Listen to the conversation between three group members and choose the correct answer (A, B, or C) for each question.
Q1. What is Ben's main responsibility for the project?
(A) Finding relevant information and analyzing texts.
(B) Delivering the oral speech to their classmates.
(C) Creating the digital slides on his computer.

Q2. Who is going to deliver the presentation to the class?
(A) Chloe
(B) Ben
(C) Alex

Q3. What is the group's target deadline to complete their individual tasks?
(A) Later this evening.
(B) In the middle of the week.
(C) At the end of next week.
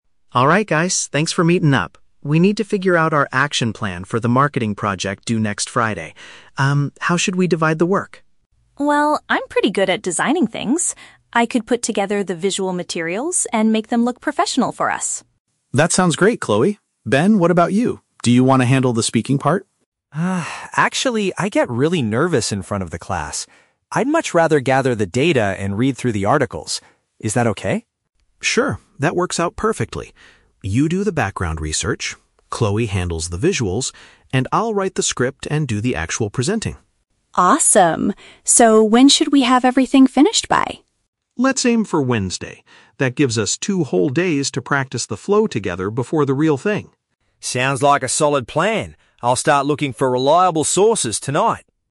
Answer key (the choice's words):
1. Finding relevant information and analyzing texts.
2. Alex
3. In the middle of the week.

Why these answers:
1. Ben says, "I'd much rather gather the data and read through the articles." Option A paraphrases this as finding information and analyzing texts. Option B is a trap; Alex originally asks Ben to do the speaking part, but Ben rejects it because he gets nervous. Option C is plausible for a project, but Chloe is the one doing the visuals, not Ben.
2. Alex states, "I'll write the script and do the actual presenting." Option C is correct. Option B is a trap because Ben was offered the role but refused it. Option A is a trap because Chloe only volunteered to design the visual materials, not to speak.
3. Alex says, "Let's aim for Wednesday." Wednesday is in the middle of the week, so Option B is the correct paraphrase. Option C is a trap; "next Friday" (the end of the week) is mentioned, but that is the day of the actual presentation, not the deadline to finish their preparation. Option A is a trap; Ben says he will start his research tonight, but it is not the deadline for the whole project.

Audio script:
Alex: Alright guys, thanks for meeting up. We need to figure out our action plan for the marketing project due next Friday. Um, how should we divide the work?
Chloe: Well, I'm pretty good at designing things. I could put together the visual materials and make them look professional for us.
Alex: That sounds great, Chloe. Ben, what about you? Do you want to handle the speaking part?
Ben: Ah, actually, I get really nervous in front of the class. I'd much rather gather the data and read through the articles. Is that okay?
Alex: Sure, that works out perfectly. You do the background research, Chloe handles the visuals, and I'll write the script and do the actual presenting.
Chloe: Awesome. So, when should we have everything finished by?
Alex: Let's aim for Wednesday. That gives us two whole days to practice the flow together before the real thing.